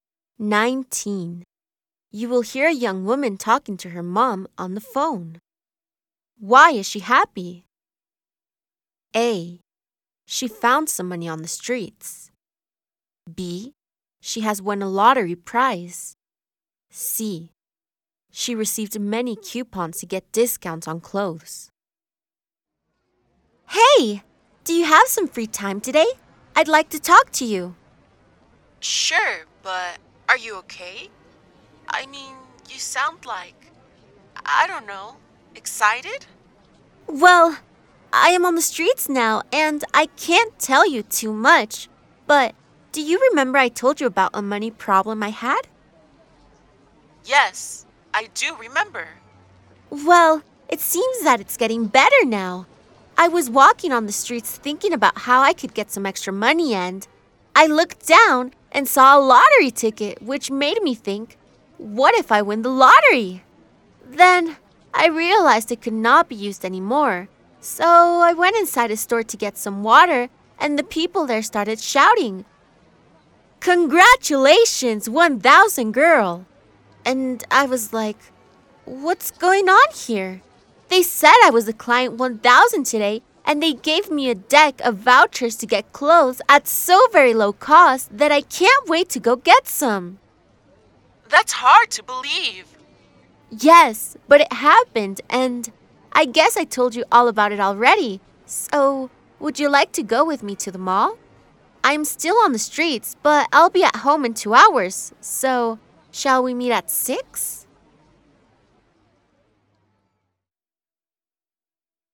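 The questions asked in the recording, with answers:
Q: Why is she happy?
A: C: She received many coupons to get discounts on clothes.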